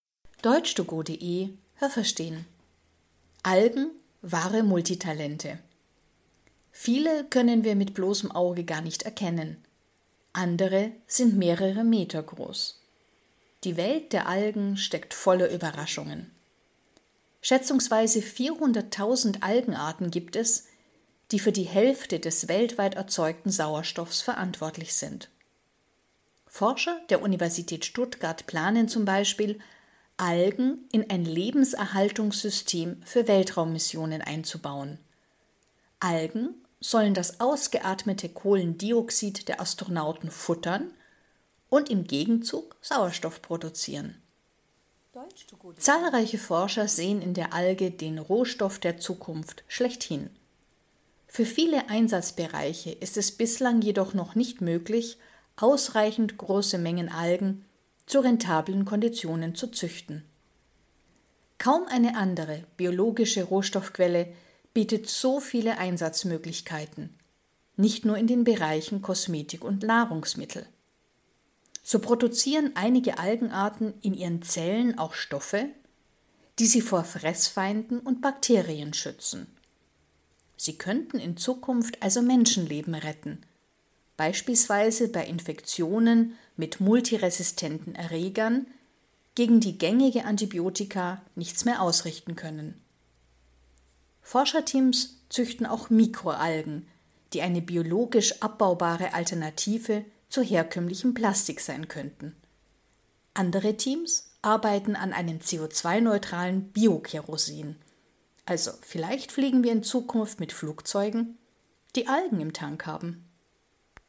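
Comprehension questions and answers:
Haben Sie das gehört? Stimmt diese Aussage?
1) Die Hälfte der 400.000 Algenarten verantwortet den weltweit erzeugten Sauerstoff.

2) Astronauten sollen im Weltraum Algen essen, um so besser einen Ausgleich zwischen ausgeatmetem Kohlendioxid und Sauerstoff zu ermöglichen.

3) Zahlreiche Forscher bezweifeln, dass Algen sich in der Zukunft als biologische Rohstoffquellen eignen.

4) Bis jetzt züchtet man Algen noch nicht in großem Umfang, weil das zu unrentabel ist.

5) Algen werden auch im Bereich Kosmetik eingesetzt.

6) Man kann in Zukunft vielleicht mit Algen Infektionen bekämpfen, bei denen bisherige Antibiotika versagen.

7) Forscher arbeiten bereits daran, mit Algen umweltschonende Stoffe zu entwickeln, die Plastik und Kerosin ersetzen können.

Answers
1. falsch
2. falsch
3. falsch
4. richtig
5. richtig
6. richtig
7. richtig

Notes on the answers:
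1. Die 400.000 Algenarten sind für die Hälfte des weltweit erzeugten Sauerstoffs verantwortlich.
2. Algen sollen das Kohlendioxid, das die Astronauten ausatmen, „essen" und im Gegenzug Sauerstoff produzieren.
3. Im Gegenteil, zahlreiche Forscher sind der Meinung, dass Algen in Zukunft die biologische Rohstoffquelle schlechthin sein werden.

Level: Hörtexte C (schwer)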